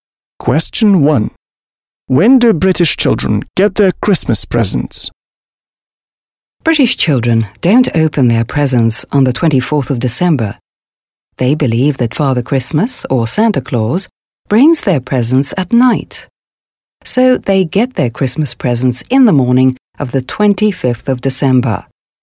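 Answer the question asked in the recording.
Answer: In the morning of the 25th of December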